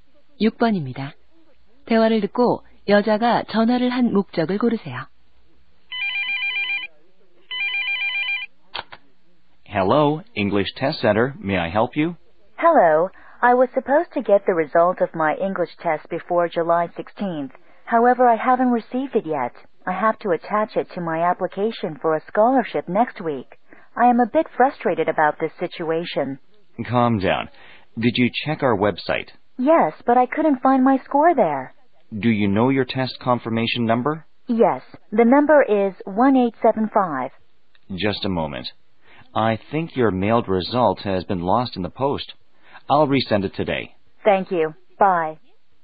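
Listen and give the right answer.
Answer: 영어 시험 성적표를 받지 못해 문의하려고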